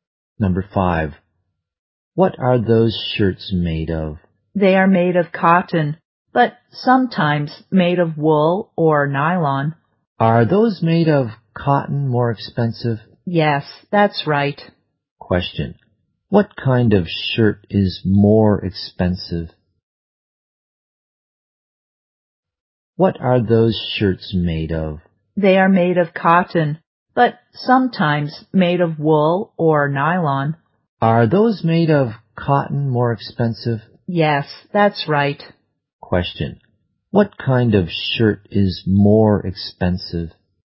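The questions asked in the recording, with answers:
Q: What kind of shirt is more expensive?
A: Shirts made of cotton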